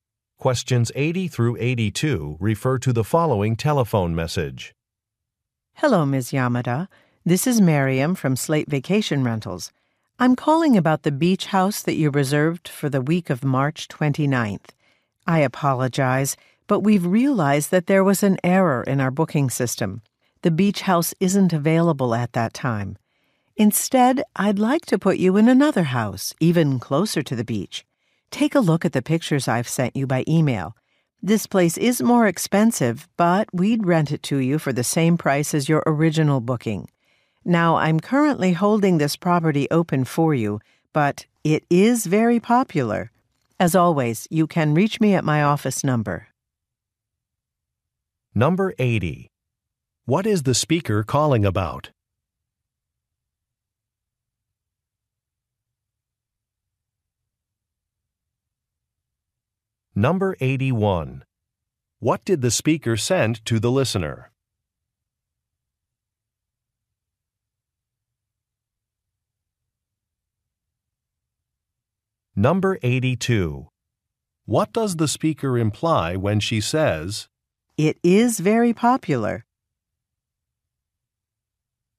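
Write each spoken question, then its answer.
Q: What is the speaker calling about?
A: A beach house reservation

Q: What did the speaker send to the listener?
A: Pictures by email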